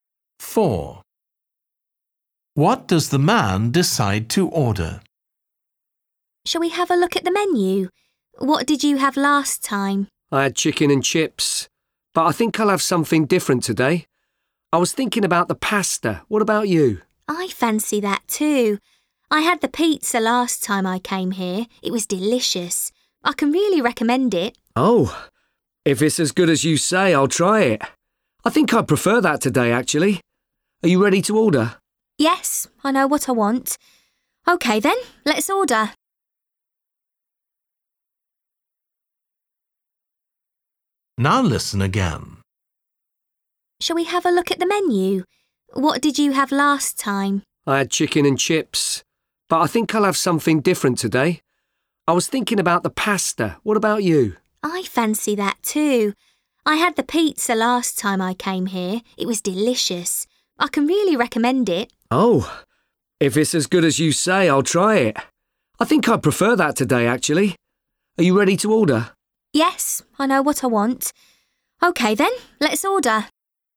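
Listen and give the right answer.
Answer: Pizza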